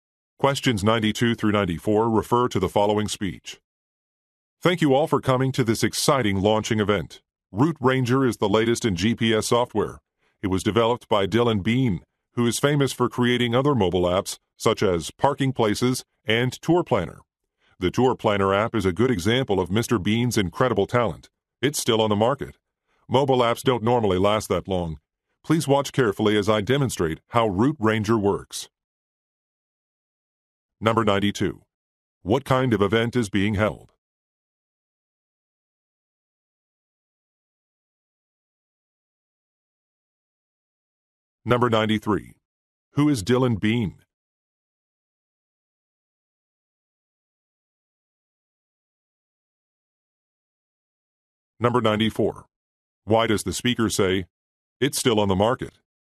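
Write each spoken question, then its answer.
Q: What kind of event is being held?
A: A product launch

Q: Who is Dylan Bean?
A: A software (app) developer

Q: Why does the speaker say, "It's still on the market"?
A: To show the app has been unusually successful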